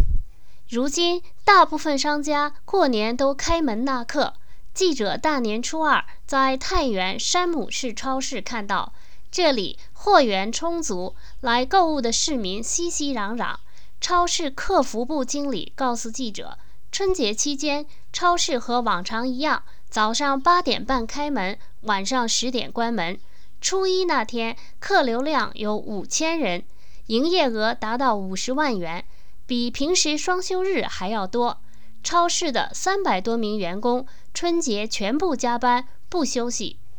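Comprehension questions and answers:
Please answer the following questions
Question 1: 太原山姆士超市平常几点关门?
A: 晚上10点

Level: 3rd Year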